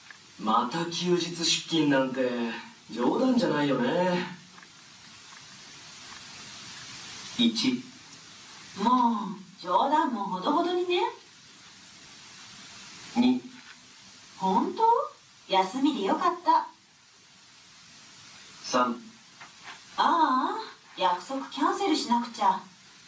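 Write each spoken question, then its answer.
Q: また休日出勤なんて冗談じゃないよね。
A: 3: ああ、約束キャンセルしなくちゃ。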